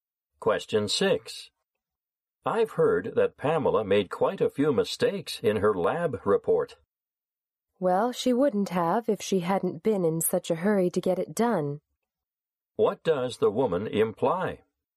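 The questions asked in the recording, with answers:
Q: What does the woman imply?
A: Pamela made mistakes because she did the report too quickly.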